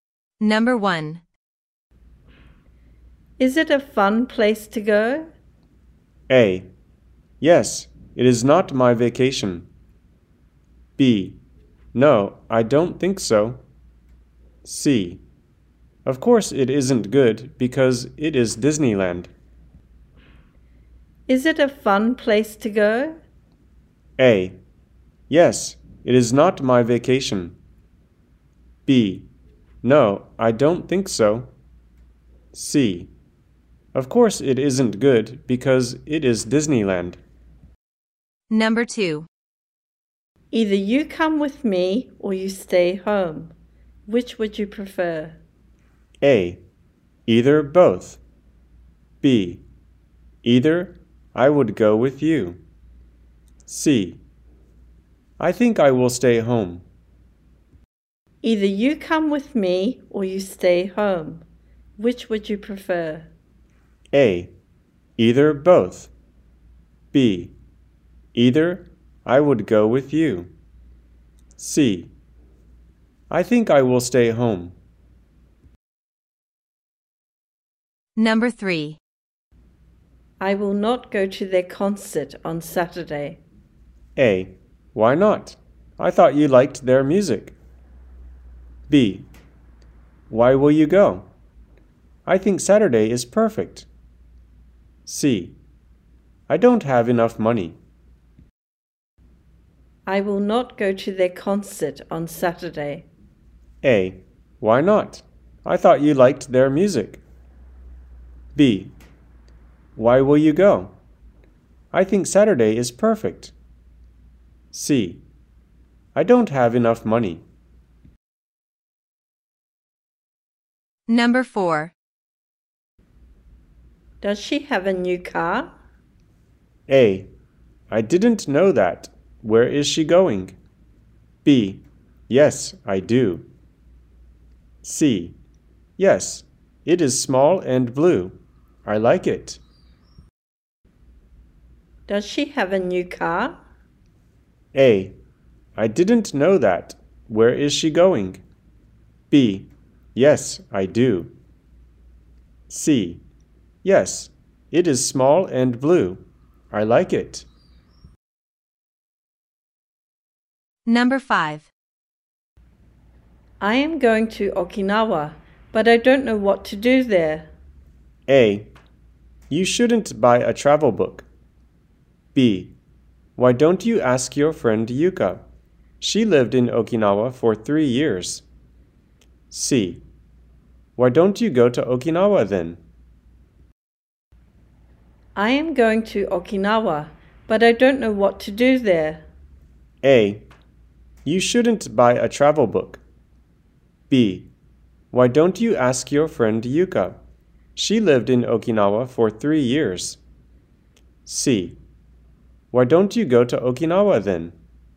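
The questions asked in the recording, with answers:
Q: Either you come with me or you stay home. Which would you prefer?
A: C: I think I will stay home.

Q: I will not go to their concert on Saturday.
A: A: Why not? I thought you liked their music.

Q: Does she have a new car?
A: C: Yes, it is small and blue. I like it.

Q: I am going to Okinawa, but I don't know what to do there.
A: B: Why don't you ask your friend Yuka? She lived in Okinawa for 3 years.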